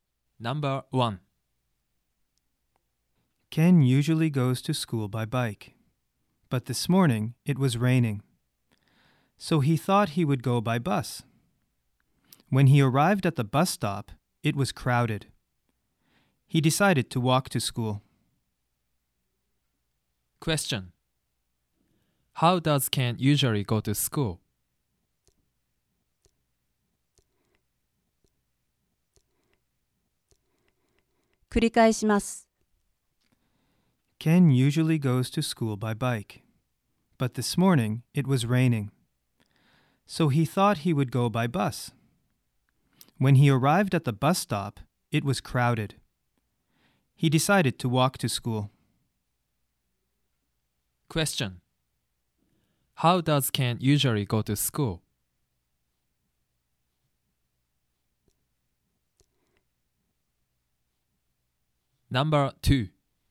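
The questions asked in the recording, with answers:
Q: How does Ken usually go to school?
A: By bike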